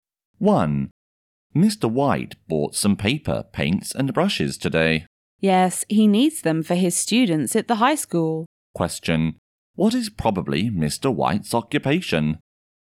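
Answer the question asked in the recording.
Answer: A teacher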